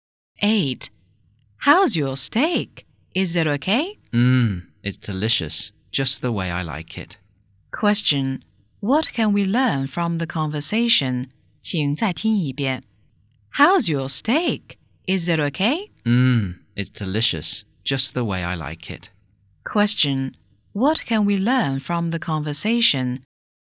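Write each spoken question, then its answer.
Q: Question, what can we learn from the conversation?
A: The speaker likes the steak; it's delicious.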